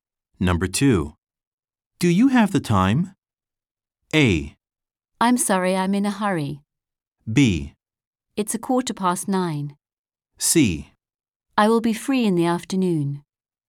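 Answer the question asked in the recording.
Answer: B: It's a quarter past 9.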